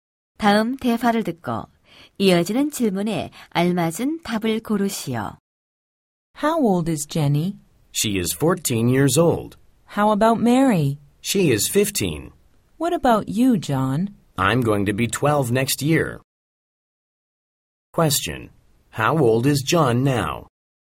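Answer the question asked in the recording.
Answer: 11 years old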